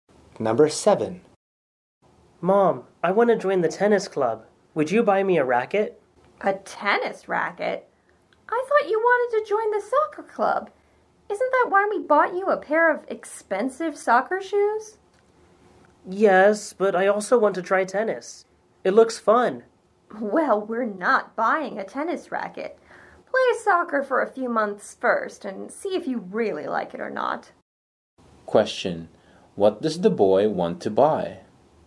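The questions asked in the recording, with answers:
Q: what does the boy want to buy?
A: A tennis racket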